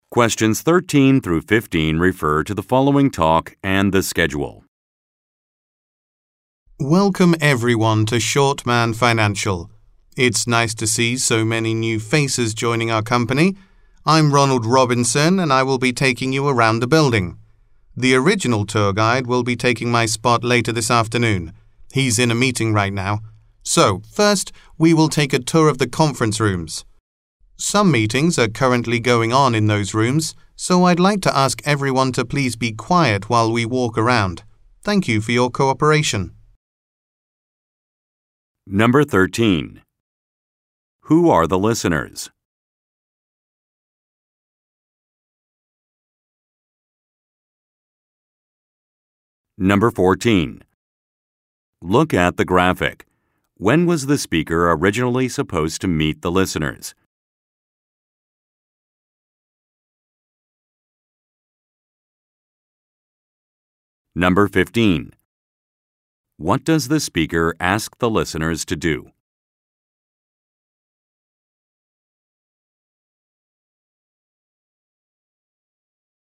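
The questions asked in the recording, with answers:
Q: Who are the listeners?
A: New employees of Shortman Financial

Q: What does the speaker ask the listeners to do?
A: Be quiet while walking around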